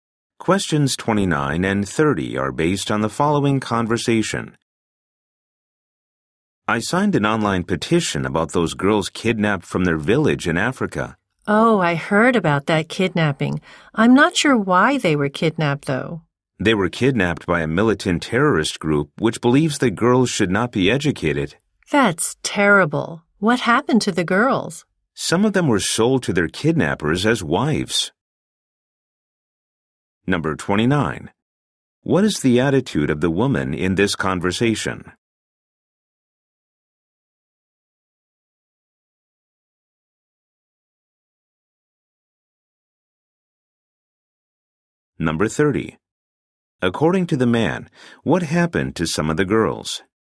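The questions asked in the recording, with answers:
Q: According to the man, what happened to some of the girls?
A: They were sold to their kidnappers as wives.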